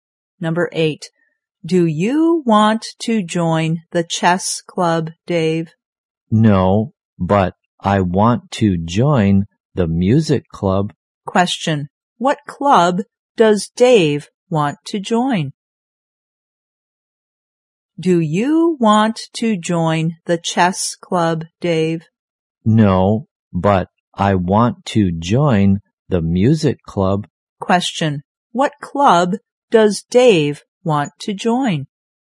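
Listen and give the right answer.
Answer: The music club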